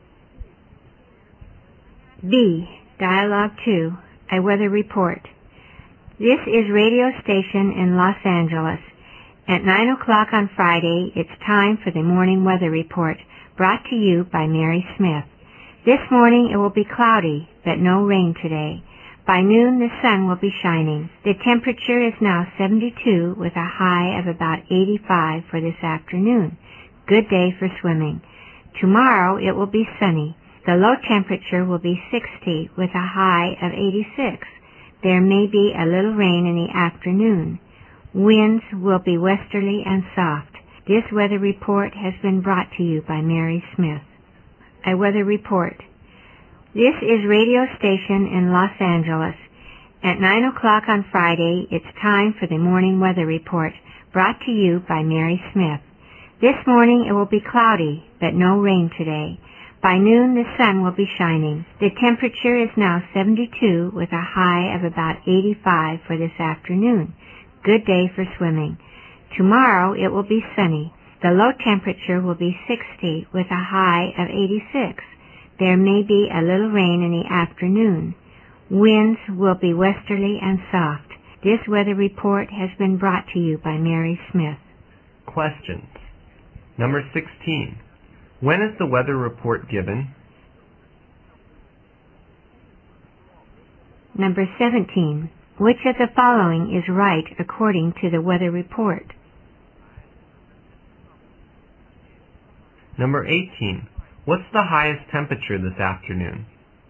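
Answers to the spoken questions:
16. At 9 o'clock on Friday morning
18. About 85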